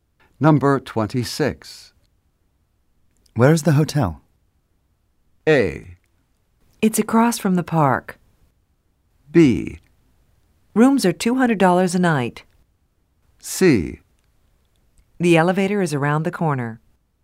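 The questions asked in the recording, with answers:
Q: Where is the hotel?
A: A: It's across from the park.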